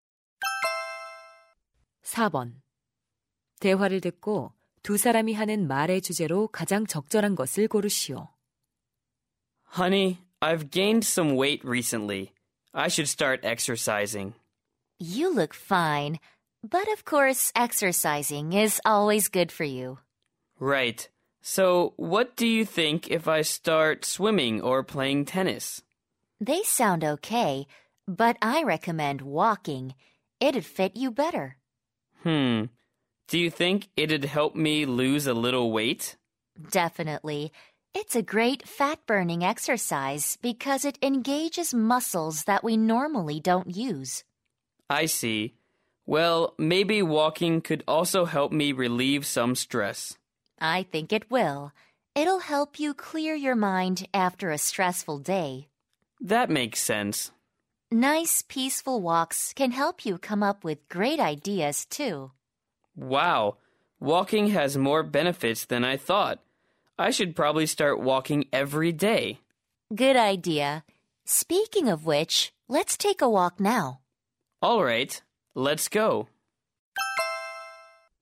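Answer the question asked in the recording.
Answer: 걷기 운동의 이점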